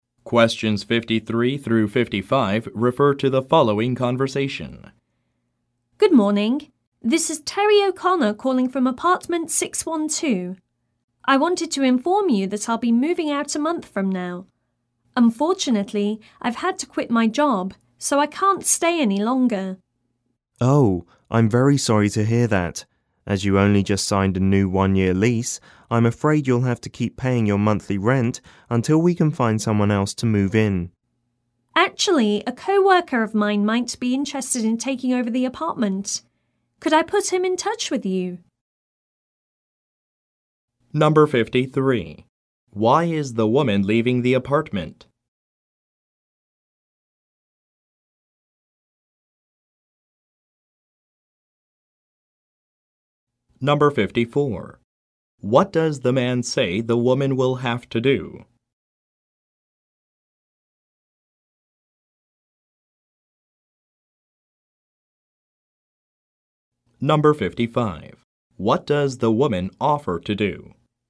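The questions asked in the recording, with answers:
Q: Why is the woman leaving the apartment?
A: She had to quit her job

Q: What does the man say the woman will have to do?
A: Keep paying her monthly rent until someone else moves in

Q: What does the woman offer to do?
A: Put a co-worker who might take over the apartment in touch with him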